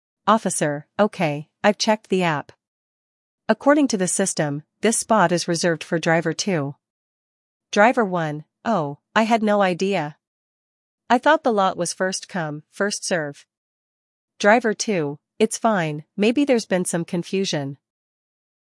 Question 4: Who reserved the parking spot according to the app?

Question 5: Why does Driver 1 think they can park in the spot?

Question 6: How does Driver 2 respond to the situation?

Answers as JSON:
{"4": "Driver 2", "5": "They thought it was first-come, first-serve", "6": "They are understanding about the confusion"}

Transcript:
Officer: Okay, I've checked the app. According to the system, this spot is reserved for Driver 2.
Driver 1: Oh, I had no idea! I thought the lot was first-come, first-serve.
Driver 2: It's fine; maybe there's been some confusion.